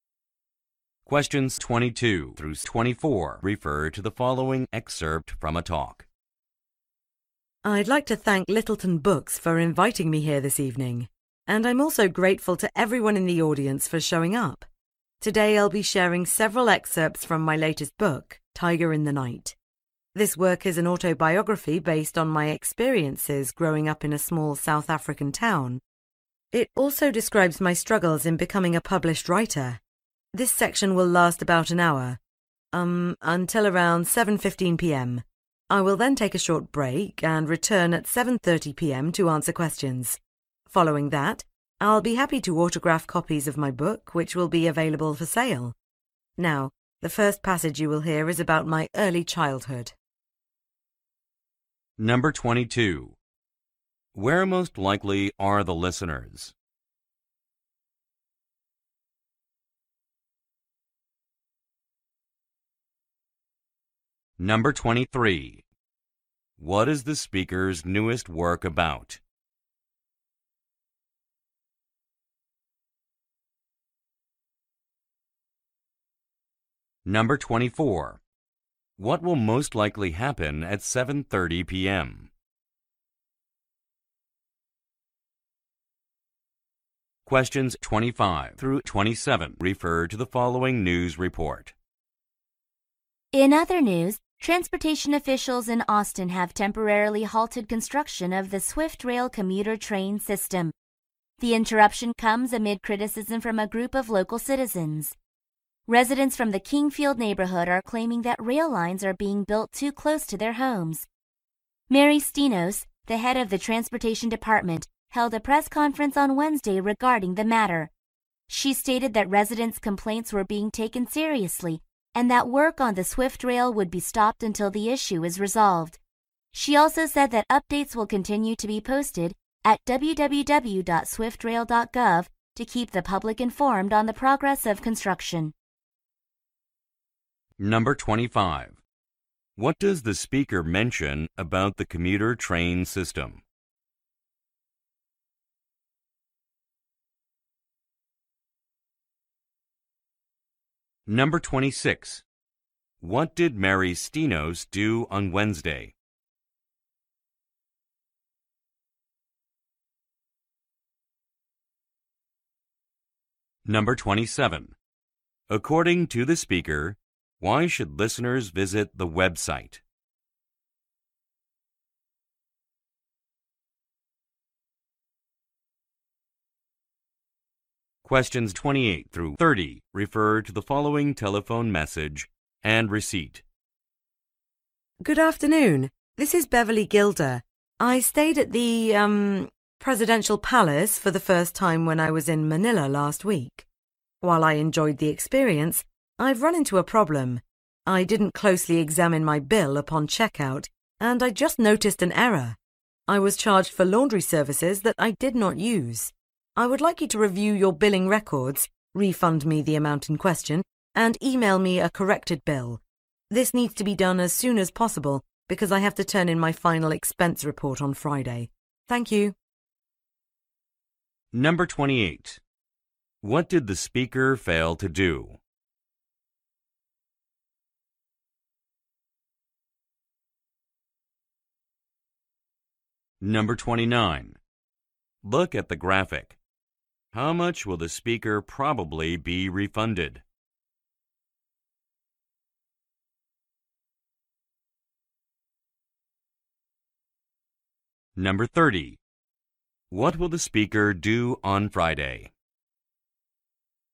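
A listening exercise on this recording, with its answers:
คําสั่ง: ฟังบทพูด และเลือกคําตอบที่ตรงกับเนื้อหาบทพูดมากที่สุด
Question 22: Where most likely are the listeners?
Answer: At a bookstore

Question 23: What is the speaker's newest work about?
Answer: Her own life growing up in a small South African town

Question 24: What will most likely happen at 7:30 p.m.?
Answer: A question-and-answer session

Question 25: What does the speaker mention about the commuter train system?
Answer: Its construction has been temporarily halted

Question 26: What did Mary Stenos do on Wednesday?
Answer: Held a press conference

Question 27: According to the speaker, why should listeners visit the Web site?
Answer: To get updates on the construction progress

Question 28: What did the speaker fail to do?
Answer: Examine her bill closely at checkout

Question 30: What will the speaker do on Friday?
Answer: Turn in her final expense report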